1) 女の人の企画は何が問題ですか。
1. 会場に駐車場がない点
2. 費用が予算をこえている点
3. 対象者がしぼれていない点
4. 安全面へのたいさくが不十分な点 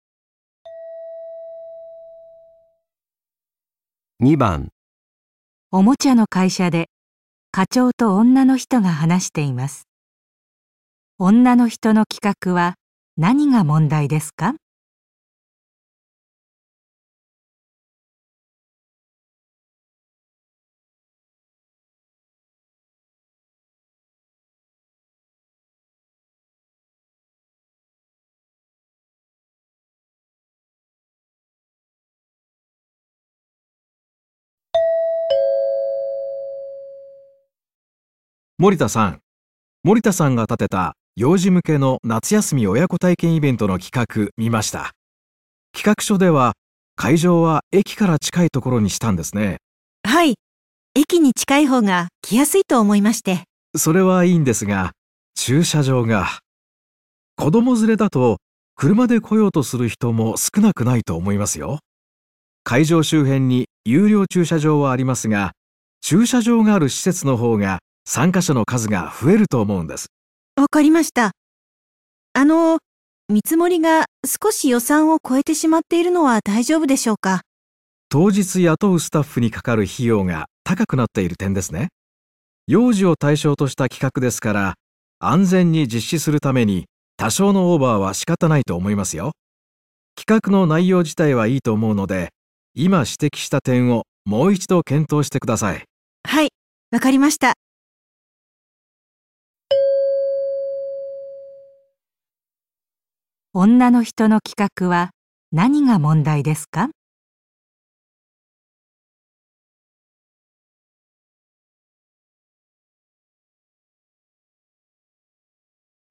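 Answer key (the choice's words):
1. 会場に駐車場がない点

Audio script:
課長:森田さん、森田さんが立てた幼児向けの夏休み親子体験のイベントの企画見ました。企画書では会場は駅から近い所にしたんですね。
女:はい、駅に近いほうが来やすいと思いまして。
課長:それはいいんですが、駐車場が・・・、子供連れだと、車で来ようとする人も少なくないと思いますよ。会場周辺に有料駐車場がありますが、駐車場がある施設のほうが増えると思うんです。
女:わかりました。あのう、見積もりが少し予算を超えてしまっているのは大丈夫でしょうか。
課長:当日に雇うスタッフにかかる費用が高くなっている点ですね。幼児を対象とした企画ですから、安全に実施するために、多少のオーバーは仕方ないと思いますよ。企画の内容自体はいいと思うので、今指摘した点をもう一度検討してください。

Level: N2 第3回】聴解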